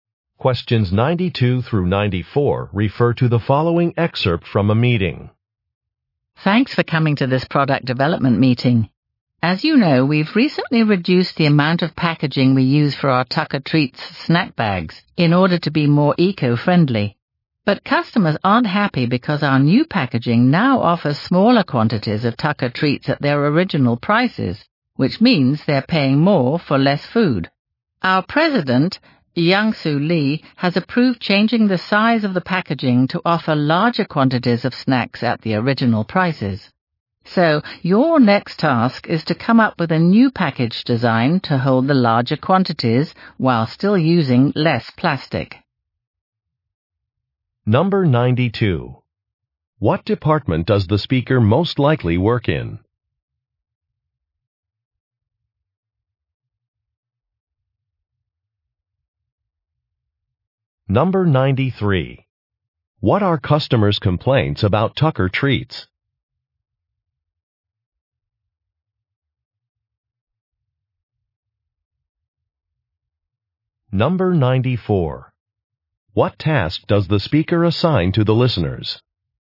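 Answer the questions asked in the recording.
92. Product development
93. They pay the same price for less food
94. Create a new package design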